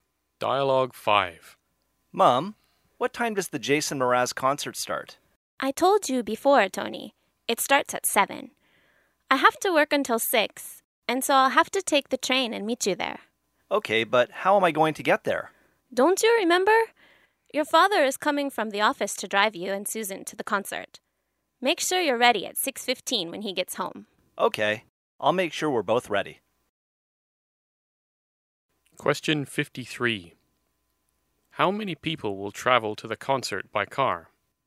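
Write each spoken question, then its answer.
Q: How many people will travel to the concert by car?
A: Three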